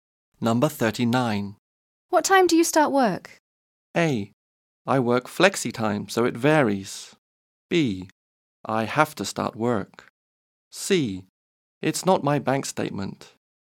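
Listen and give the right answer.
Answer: A: I work flexi time, so it varies.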